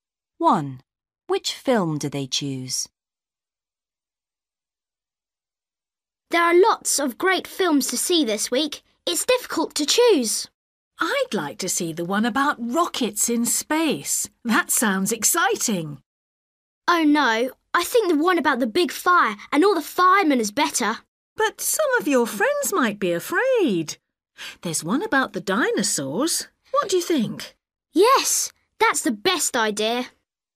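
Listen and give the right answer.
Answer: the one about dinosaurs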